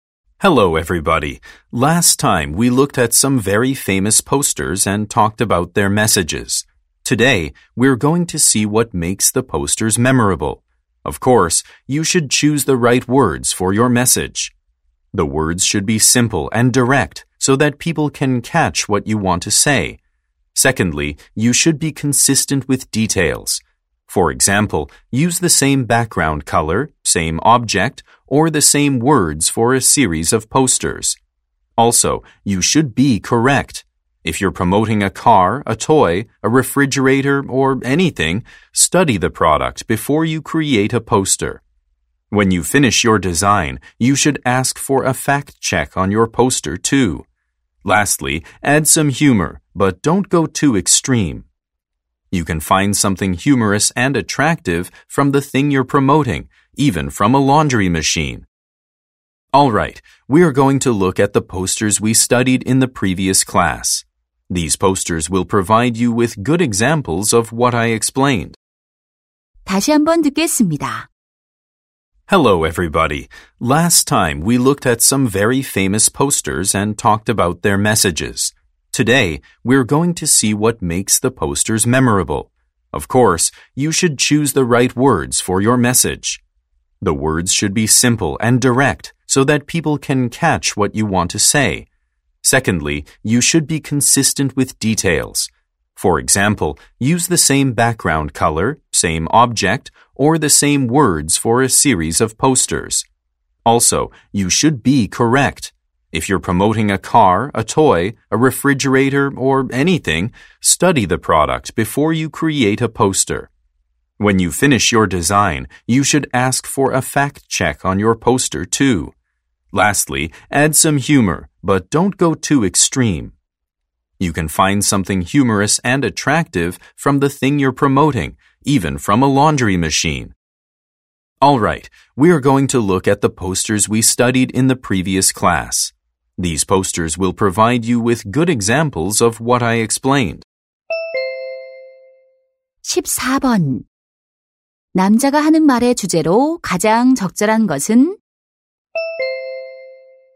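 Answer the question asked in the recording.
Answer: 포스터를 기억에 남게 만드는 방법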